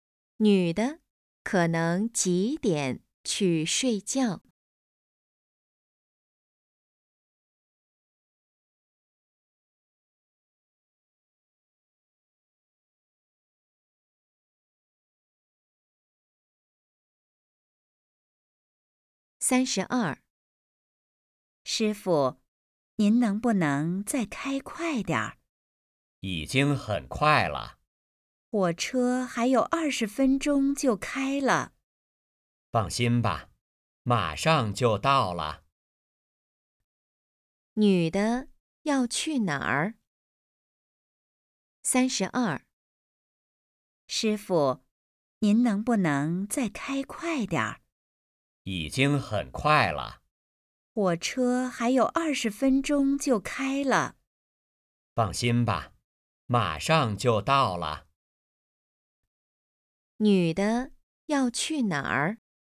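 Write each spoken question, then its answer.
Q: 女的要去哪儿?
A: 火车站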